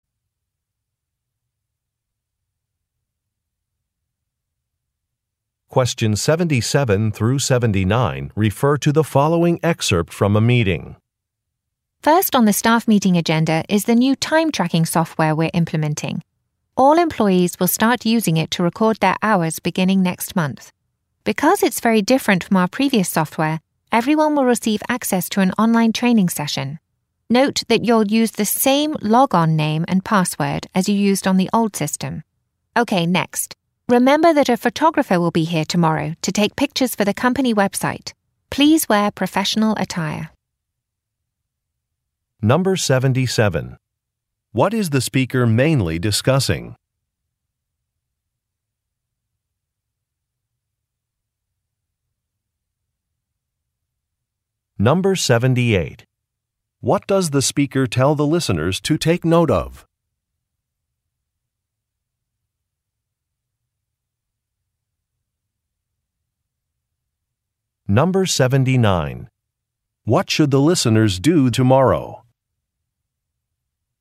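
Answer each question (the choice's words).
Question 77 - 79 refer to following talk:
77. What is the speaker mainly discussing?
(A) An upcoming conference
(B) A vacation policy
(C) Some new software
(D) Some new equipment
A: Some new software

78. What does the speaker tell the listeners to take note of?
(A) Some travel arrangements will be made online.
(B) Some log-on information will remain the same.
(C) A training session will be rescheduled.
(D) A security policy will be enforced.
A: Some log-on information will remain the same.

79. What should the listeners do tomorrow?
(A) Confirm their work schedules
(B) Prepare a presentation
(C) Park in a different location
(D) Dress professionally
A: Dress professionally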